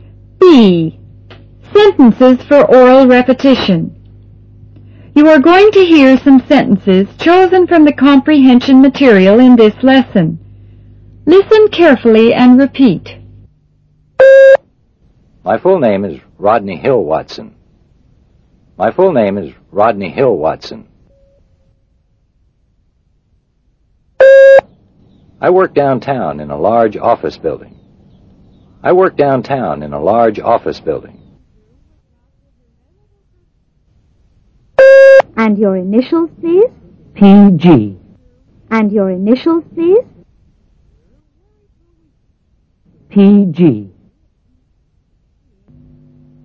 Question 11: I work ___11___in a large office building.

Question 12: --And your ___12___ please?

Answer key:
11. downtown
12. initials

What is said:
B. Sentences for Oral Repetition
Directions: You are going to hear some sentences chosen from the comprehension material in this lesson. Listen carefully and repeat.
1. My full name is Rodney Hill Watson.